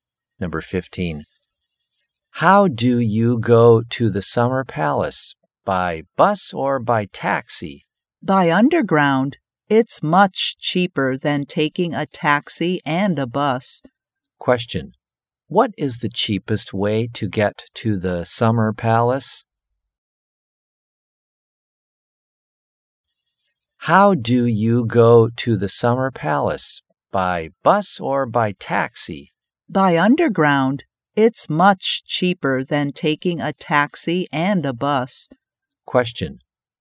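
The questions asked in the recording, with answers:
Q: Question. What is the cheapest way to get to the Summer Palace?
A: By underground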